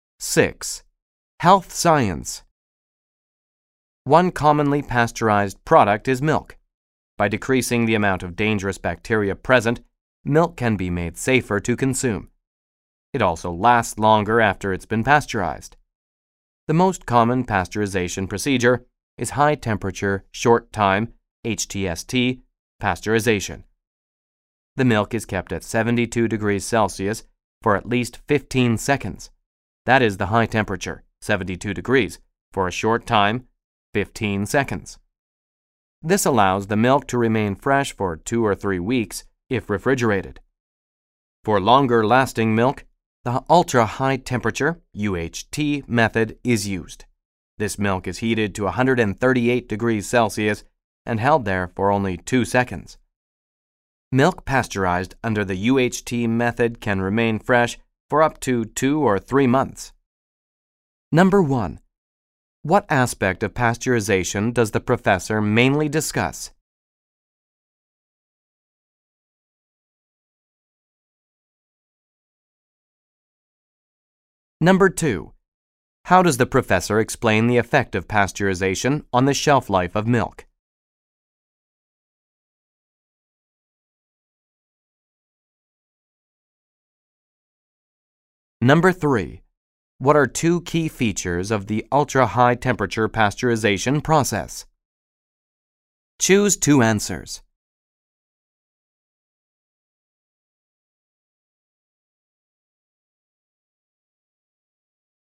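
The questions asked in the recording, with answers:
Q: What are two key features of the ultra-high temperature pasteurization process? Choose two answers.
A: Milk is heated to 138 degrees Celsius; it is held there for only 2 seconds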